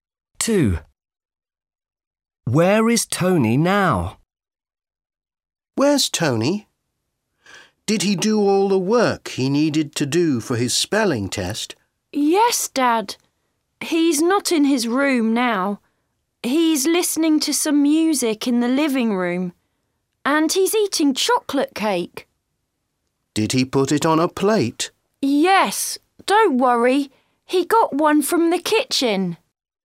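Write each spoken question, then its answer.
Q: Where is Tony now?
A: in the living room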